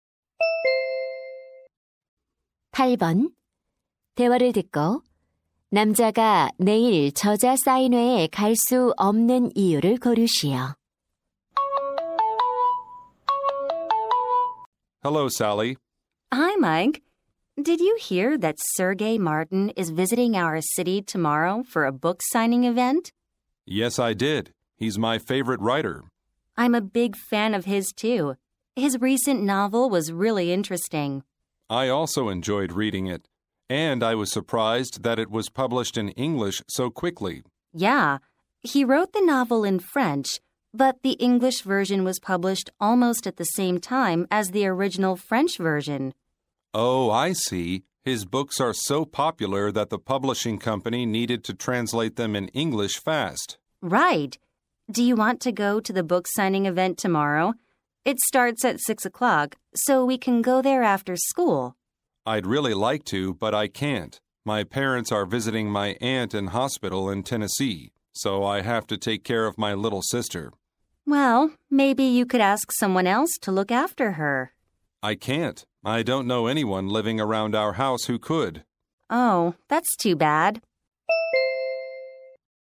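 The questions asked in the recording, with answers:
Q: 대화를 듣고 남자가 내일 저자 사인회에 갈 수 없는 이유를 고르시오.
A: 여동생을 돌봐야 해서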